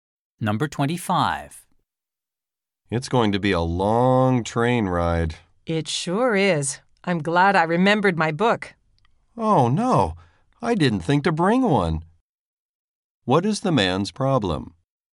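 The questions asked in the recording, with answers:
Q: What is the man's problem?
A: He forgot to bring a book.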